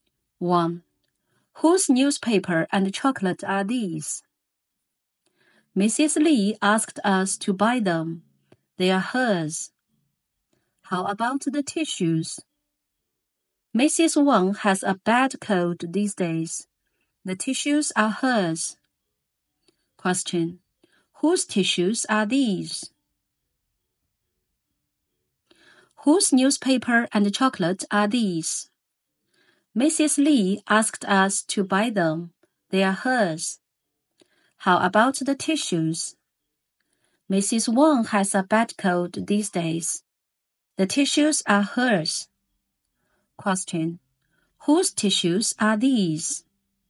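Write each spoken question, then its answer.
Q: Whose tissues are these?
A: Mrs. Wang's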